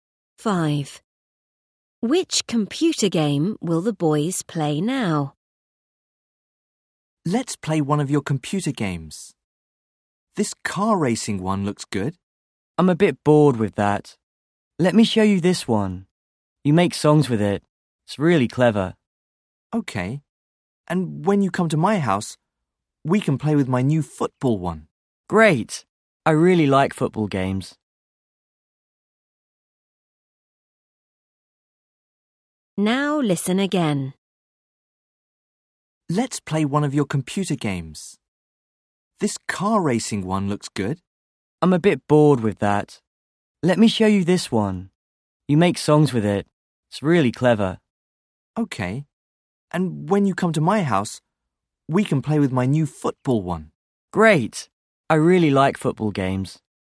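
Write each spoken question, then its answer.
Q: Which computer game will the boys play now?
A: the game where you make songs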